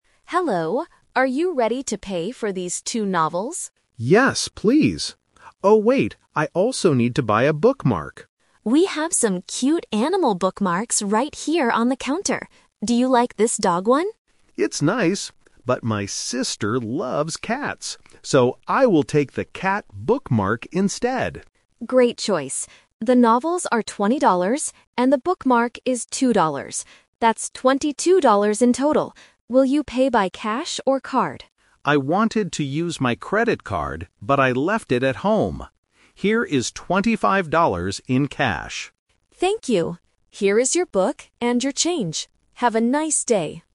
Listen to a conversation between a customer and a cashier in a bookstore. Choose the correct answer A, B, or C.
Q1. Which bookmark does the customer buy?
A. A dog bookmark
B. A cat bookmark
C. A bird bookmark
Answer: A cat bookmark

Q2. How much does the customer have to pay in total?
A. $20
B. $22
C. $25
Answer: $22

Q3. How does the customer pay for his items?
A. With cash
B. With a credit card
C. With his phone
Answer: With cash

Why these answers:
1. The customer says, "I will take the cat bookmark instead."
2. The cashier says, "The novels are $20, and the bookmark is $2. That's $22 in total."
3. The customer says, "Here is $25 in cash."

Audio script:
Cashier: Hello! Are you ready to pay for these two novels?
Customer: Yes, please. Oh wait, I also need to buy a bookmark.
Cashier: We have some cute animal bookmarks right here on the counter. Do you like this dog one?
Customer: It's nice, but my sister loves cats. So, I will take the cat bookmark instead.
Cashier: Great choice. The novels are $20, and the bookmark is $2. That's $22 in total. Will you pay by cash or card?
Customer: I wanted to use my credit card, but I left it at home. Here is $25 in cash.

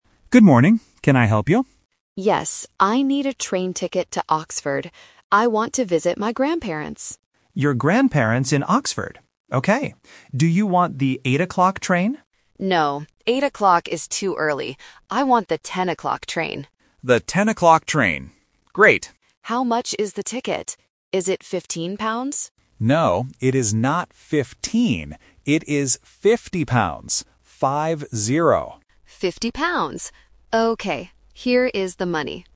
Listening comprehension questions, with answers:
Listen to the conversation at the train station. Choose the correct answer (A, B, or C) for each question.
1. Who is the passenger going to visit?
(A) Her parents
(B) Her grandparents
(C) Her aunt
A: Her grandparents

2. What time is the passenger's train?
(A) 8 o'clock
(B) 10 o'clock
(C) 12 o'clock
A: 10 o'clock

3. How much is the train ticket?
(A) 15 pounds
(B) 50 pounds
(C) 5 pounds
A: 50 pounds

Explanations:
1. The passenger says, "I want to visit my grandparents." The agent also repeats this word. Option A (parents) and Option C (aunt) are family words, but they are not mentioned in the audio.
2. The agent asks about the "8 o'clock" train (Option A is the trap). The passenger says "No" because it is too early, and chooses the "10 o'clock" train. Option C (12 o'clock) is a plausible time but is never mentioned.
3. The passenger asks if the ticket is "15 pounds" (Option A is the phonetic trap). The agent corrects her, saying "No, it is not 15. It is 50 pounds." He also repeats "Five-zero" to be clear. Option C (5 pounds) is just a plausible number.

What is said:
Agent: Good morning. Can I help you?
Passenger: Yes, I need a train ticket to Oxford. I want to visit my grandparents.
Agent: Your grandparents in Oxford. Okay. Do you want the 8 o'clock train?
Passenger: No, 8 o'clock is too early. I want the 10 o'clock train.
Agent: The 10 o'clock train. Great.
Passenger: How much is the ticket? Is it 15 pounds?
Agent: No, it is not 15. It is 50 pounds. Five-zero.

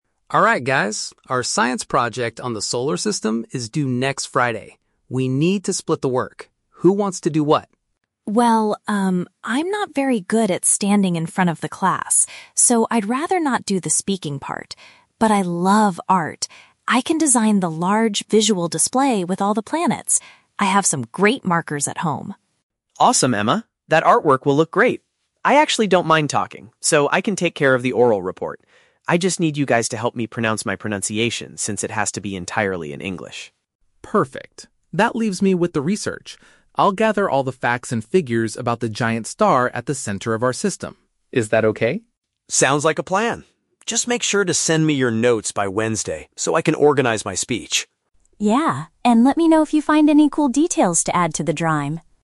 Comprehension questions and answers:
Listen to the conversation between three students and choose the correct answer (A, B, or C) for each question.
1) What is Emma's main responsibility for the project?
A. Delivering the oral presentation to the class.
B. Creating a large artwork showing the planets.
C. Writing the script for the English speech.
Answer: Creating a large artwork showing the planets.

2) Why does Ben offer to do the speaking part?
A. Because his English pronunciation is already perfect.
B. Because he feels comfortable talking in front of others.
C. Because he doesn't want to spend time doing research.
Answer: Because he feels comfortable talking in front of others.

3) Which topic will Alex focus his research on?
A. The central star of our planetary system.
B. The different sizes of the eight planets.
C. The history of space exploration.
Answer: The central star of our planetary system.

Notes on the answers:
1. Emma says she will "design the large visual display with all the planets." (visual display = artwork / poster). Option (A) is The Trap: Ben is doing the speaking part, and Emma explicitly says "I'd rather not do the speaking part." Option (C) is plausible for a group project but is never mentioned.
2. Ben says, "I actually don't mind talking," which means he is comfortable doing it. Option (A) is The Trap: He mentions his English pronunciation, but he says he needs help to practice it, meaning it is not perfect yet. Option (C) is not mentioned.
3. Alex says he will gather facts about the "giant star at the center of our system," which is a paraphrase for the Sun. Option (B) is The Trap: The planets are mentioned, but that is Emma's job to draw them, not Alex's job to research them. Option (C) is not mentioned.

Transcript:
Alex: Alright guys, our science project on the Solar System is due next Friday. We need to split the work. Who wants to do what?
Emma: Well, um, I'm not very good at standing in front of the class, so I'd rather not do the speaking part. But I love art. I can design the large visual display with all the planets. I have some great markers at home.
Ben: Awesome, Emma. That artwork will look great. I actually don't mind talking, so I can take care of the oral report. I just need you guys to help me practice my pronunciation since it has to be entirely in English.
Alex: Perfect. That leaves me with the research. I'll gather all the facts and figures about the giant star at the center of our system. Is that okay?
Ben: Sounds like a plan. Just make sure to send me your notes by Wednesday so I can organize my speech.

